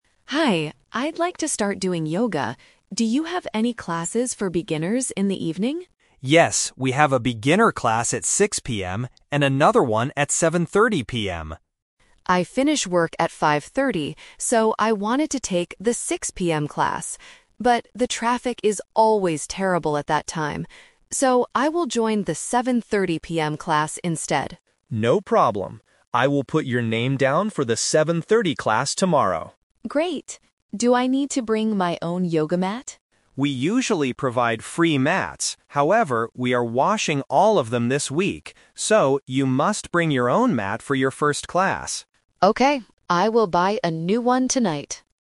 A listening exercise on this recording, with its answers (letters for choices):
Listen to the conversation between a customer and a sports center staff member. Choose the correct answer (A, B, or C) for each question.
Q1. What time will the customer take the yoga class?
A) At 5:30 PM.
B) At 6:00 PM.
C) At 7:30 PM.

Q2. Why doesn't the customer choose the earlier class?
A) Because she finishes work very late.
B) Because the traffic is bad.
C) Because the earlier class is full.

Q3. Why must the customer bring her own yoga mat tomorrow?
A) Because the center's mats are being washed.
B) Because the center does not have any free mats.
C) Because she wants to use her new mat.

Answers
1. C
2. B
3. A

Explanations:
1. The customer decides, "I will join the 7:30 PM class instead." Option (B) is a trap; she wanted the 6:00 PM class at first but changed her mind because of the traffic. Option (A) is also a trap; 5:30 PM is the time she finishes work, not the class time.
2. The customer clearly says, "But the traffic is always terrible at that time." Option (A) is a trap; she finishes work at 5:30, which is not late, but the traffic makes her late. Option (C) is a plausible reason for a class change but is never mentioned.
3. The staff member explains, "we are washing all of them this week. So, you must bring your own mat". Option (B) is a trap; the center usually provides free mats, but they are just not available right now. Option (C) is a trap; she decides to buy a new one after hearing she needs to bring one, it wasn't her original reason.

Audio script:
Customer: Hi, I'd like to start doing yoga. Do you have any classes for beginners in the evening?
Staff: Yes, we have a beginner class at 6:00 PM and another one at 7:30 PM.
Customer: I finish work at 5:30, so I wanted to take the 6:00 PM class. But the traffic is always terrible at that time. So, I will join the 7:30 PM class instead.
Staff: No problem. I will put your name down for the 7:30 class tomorrow.
Customer: Great. Do I need to bring my own yoga mat?
Staff: We usually provide free mats. However, we are washing all of them this week. So, you must bring your own mat for your first class.